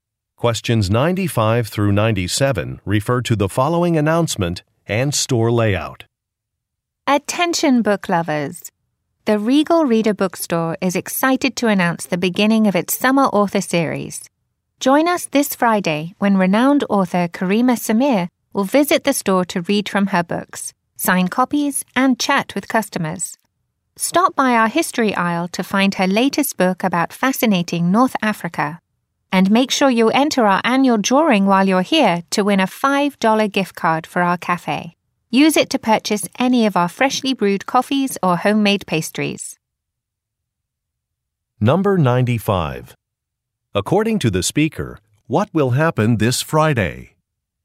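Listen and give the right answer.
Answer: An author will visit the store to read from her books, sign copies, and chat with customers.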